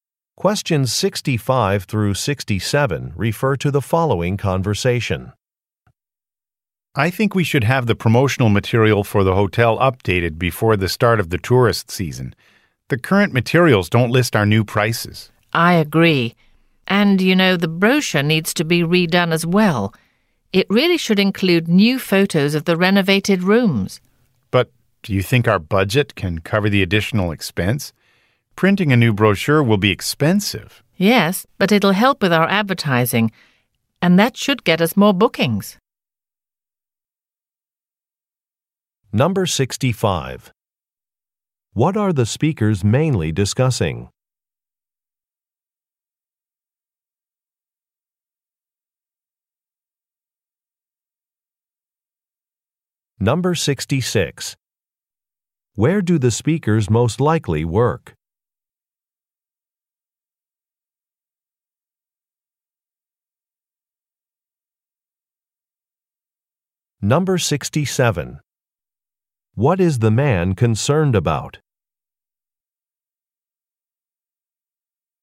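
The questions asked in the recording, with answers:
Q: What are the speakers mainly discussing?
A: Updating the hotel's promotional materials

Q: Where do the speakers most likely work?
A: At a hotel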